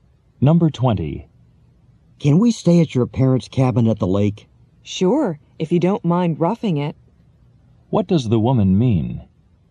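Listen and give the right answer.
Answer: Yes, but the cabin is basic, without comforts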